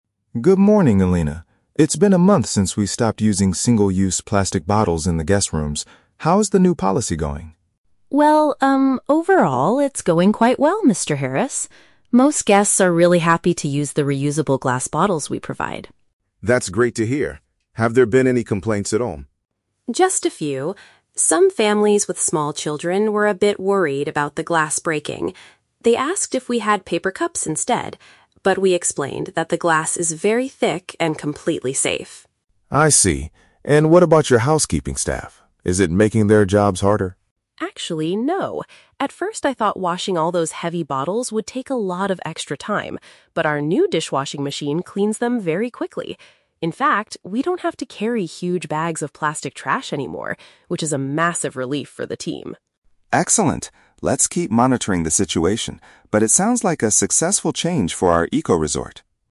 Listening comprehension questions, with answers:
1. How do the majority of the visitors feel about the new room items?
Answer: They are pleased with the eco-friendly containers.

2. What concern did a specific group of guests have?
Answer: They felt the new items might be dangerous for their kids.

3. How has the plastic reduction policy affected the cleaning staff?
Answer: They feel better because they have less rubbish to move around.

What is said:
It's been a month since we stopped using single-use plastic bottles in the guest rooms. How is the new policy going?
Elena: Well, um, overall, it's going quite well, Mr. Harris. Most guests are really happy to use the reusable glass bottles we provide.
Mr. Harris: That's great to hear. Have there been any complaints at all?
Elena: Just a few. Some families with small children were a bit worried about the glass breaking. They asked if we had paper cups instead. But we explained that the glass is very thick and completely safe.
Mr. Harris: I see. And what about your housekeeping staff? Is it making their jobs harder?
Elena: Actually, no. At first, I thought washing all those heavy bottles would take a lot of extra time. But our new dishwashing machine cleans them very quickly. In fact, we don't have to carry huge bags of plastic trash anymore, which is a massive relief for the team.
Mr. Harris: Excellent. Let's keep monitoring the situation, but it sounds like a successful change for our eco-resort.